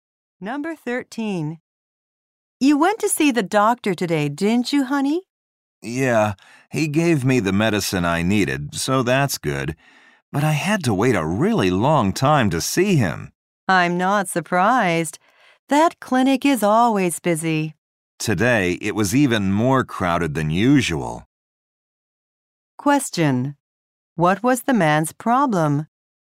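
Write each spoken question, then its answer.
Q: What was the man's problem?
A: He had to wait a long time to see the doctor.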